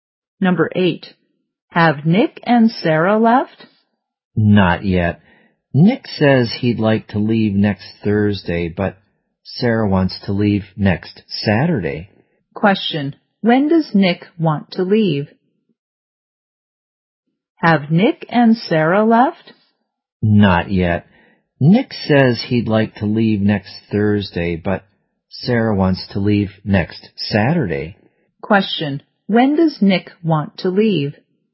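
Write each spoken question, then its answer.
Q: Question, when does Nick want to leave?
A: Next Thursday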